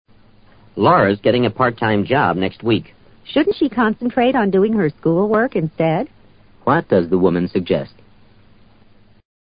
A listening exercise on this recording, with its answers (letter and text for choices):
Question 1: What does the woman suggest?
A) Laura really needs a fulltime job.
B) Laura already has a job working for the school.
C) Laura needs to spend her time studying.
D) Laura should think about becoming a teacher.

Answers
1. C) Laura needs to spend her time studying.

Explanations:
她以否定问话形式表示了她不赞成Laura课外打工的态度,表明她认为Laura应集中精力于学习(school work)。a part–time job指学生在学习期间课外的工作。 a full time job:全日工作。